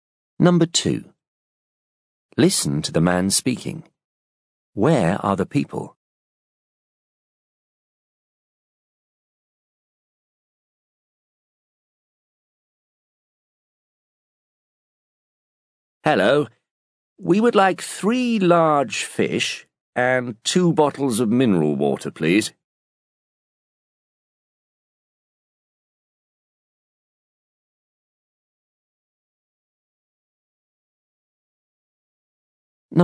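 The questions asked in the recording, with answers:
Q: Where are the people?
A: In a restaurant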